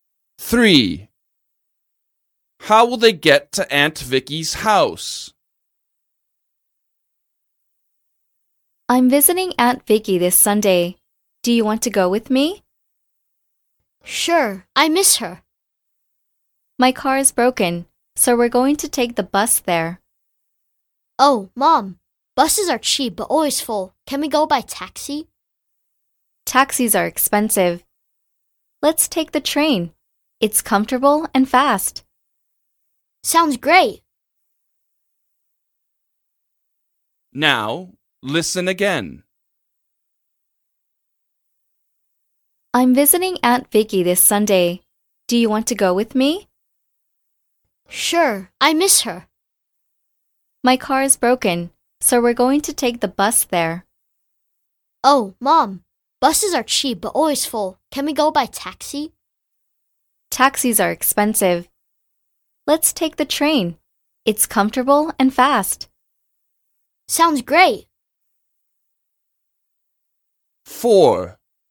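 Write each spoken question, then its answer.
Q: How will they get to Aunt Vicky's house?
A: by train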